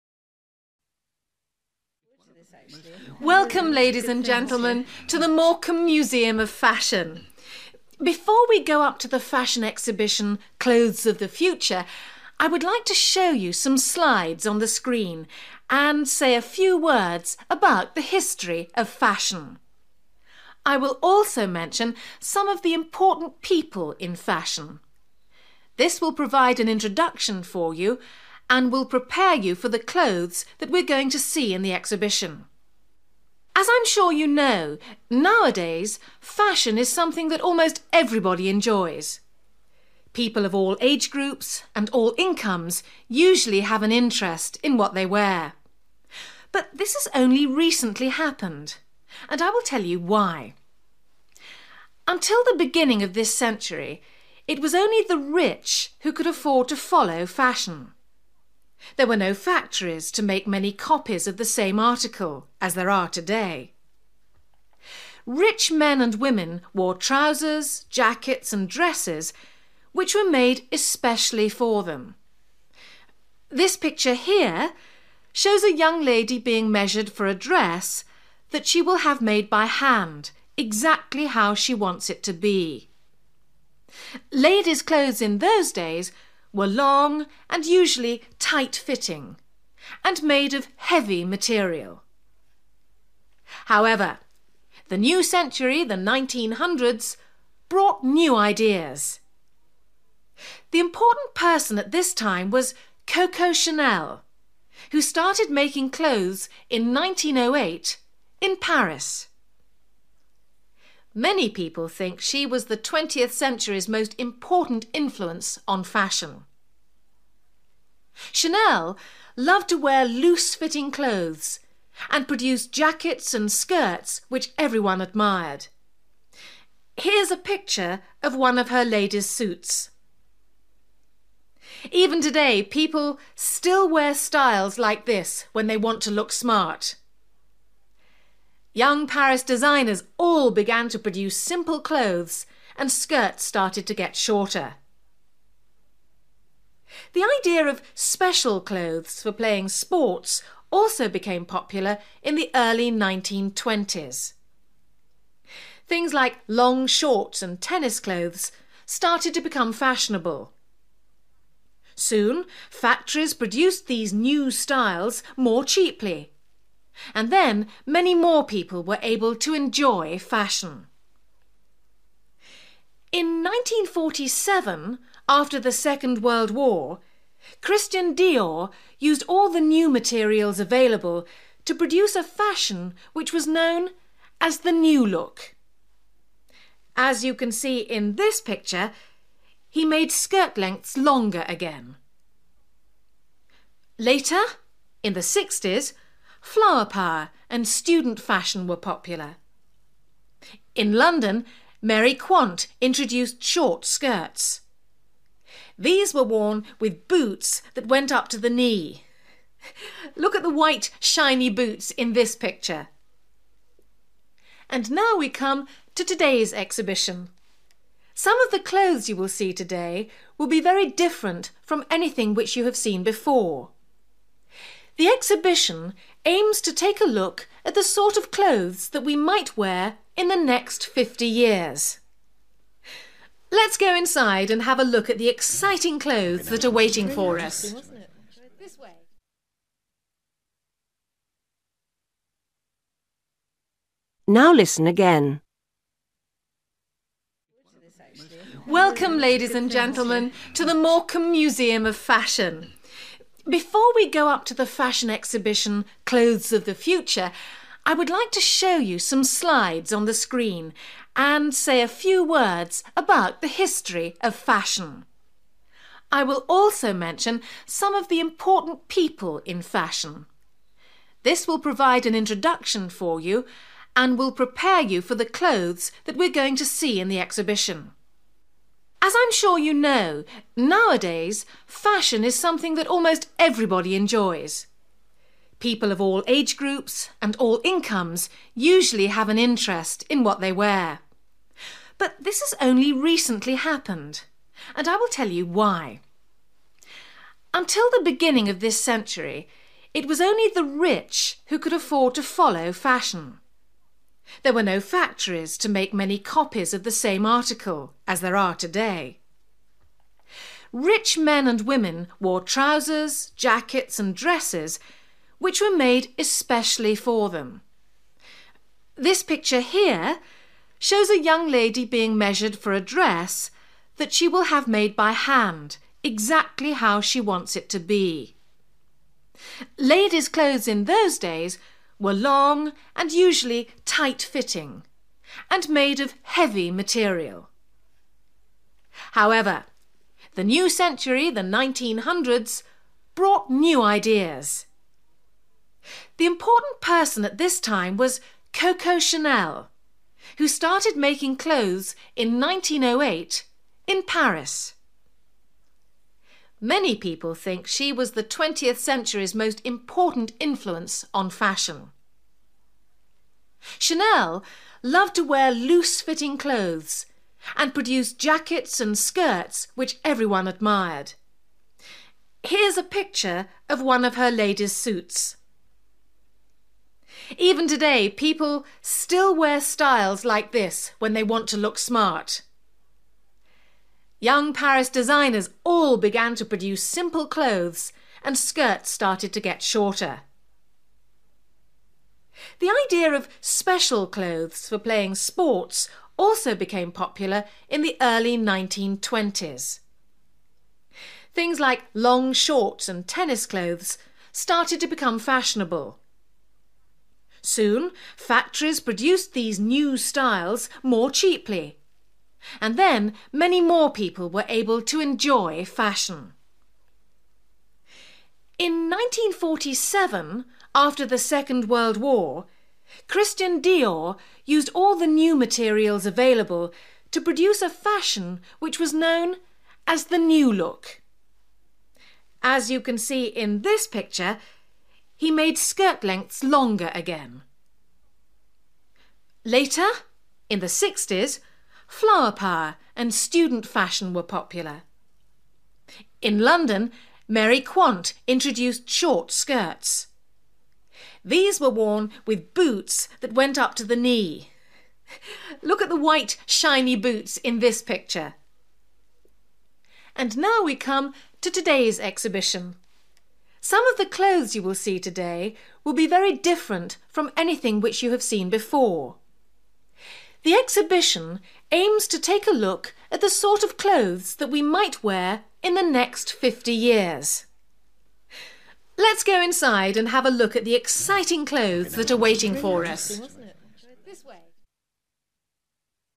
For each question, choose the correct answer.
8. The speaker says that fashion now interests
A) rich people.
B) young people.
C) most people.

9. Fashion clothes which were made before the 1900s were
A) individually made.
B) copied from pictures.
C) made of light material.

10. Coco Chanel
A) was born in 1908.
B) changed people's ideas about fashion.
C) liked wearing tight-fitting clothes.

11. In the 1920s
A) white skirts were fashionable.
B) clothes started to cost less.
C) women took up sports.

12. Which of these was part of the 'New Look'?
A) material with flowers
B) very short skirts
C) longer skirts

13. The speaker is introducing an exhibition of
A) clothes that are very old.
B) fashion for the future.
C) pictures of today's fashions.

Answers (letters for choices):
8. C
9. A
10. B
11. B
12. C
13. B

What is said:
Guide: Welcome, ladies and gentleman, to the Morecambe Museum of Fashion. Before we go up to the fashion exhibition 'Clothes of the Future', I would like to show you some slides on the screen, and say a few words about the history of fashion. I will also mention some of the important people in fashion. This will provide an introduction for you and will prepare you for the clothes that we're going to see in the exhibition.
As I'm sure you know, nowadays fashion is something that almost everybody enjoys. People of all age groups and all incomes usually have an interest in what they wear. But this has only recently happened, and I will tell you why.
Until the beginning of this century, it was only the rich who could afford to follow fashion. There were no factories to make many copies of the same article, as there are today. Rich men and women wore trousers, jackets and dresses which were made especially for them. This picture here shows a young lady being measured for a dress that she will have made by hand, exactly how she wants it to be. Ladies' clothes in those days were long and usually tight-fitting and made of heavy material.
However, the new century – the 1900s – brought new ideas. The important person at this time was Coco Chanel, who started making clothes in 1908, in Paris. Many people think she was the 20th century's most important influence on fashion. Chanel loved to wear loose-fitting clothes and produced jackets and skirts which everyone admired. Here's a picture of one of her ladies' suits. Even today people still wear styles like this when they want to look smart. Young Paris designers all began to produce simple clothes, and skirts started to get shorter.
The idea of special clothes for playing sports also became popular in the early 1920s. Things like long shorts and tennis clothes started to become fashionable. Soon factories produced these new styles more cheaply, and then many more people were able to enjoy fashion.
In 1947, after the second world war, Christian Dior used all the new materials available to produce a fashion which was known as the 'New Look'. As you can see in this picture, he made skirt lengths longer again.
Later, in the 60s, 'flower power' and student fashion were popular. In London, Mary Quant introduced short skirts. These were worn with boots that went up to the knee. Look at the white, shiny boots in this picture!
And now we come to today's exhibition. Some of the clothes you will see today will be very different from anything which you have seen before. The exhibition aims to take a look at the sort of clothes that we might wear in the next 50 years.
Let's go inside and have a look at the exciting clothes that are waiting for us ...

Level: B1